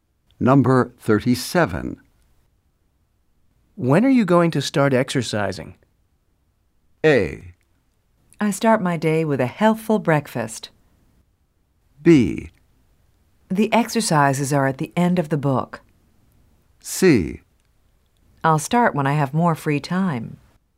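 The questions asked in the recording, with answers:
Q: When are you going to start exercising?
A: C: I'll start when I have more free time.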